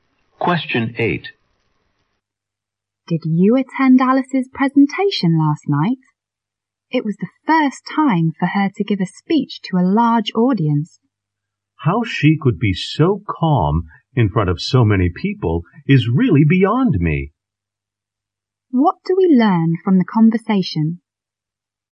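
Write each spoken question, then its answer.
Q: What do we learn from the conversation?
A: Alice was surprisingly calm giving her first speech to a large audience.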